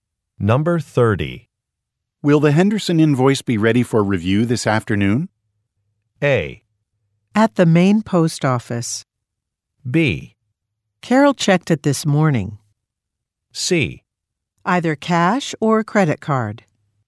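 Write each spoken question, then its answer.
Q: Will the Henderson invoice be ready for review this afternoon?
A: B: Carol checked it this morning.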